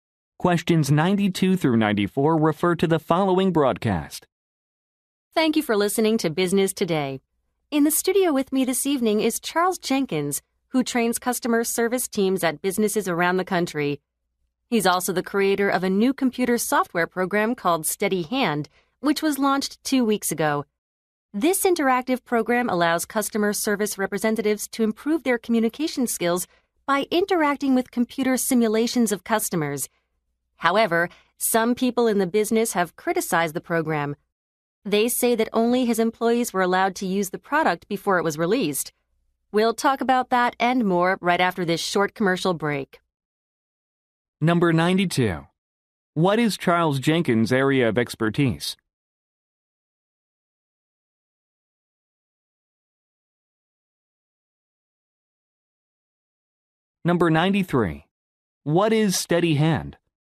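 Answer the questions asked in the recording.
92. Customer service training
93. A computer software program for training customer service communication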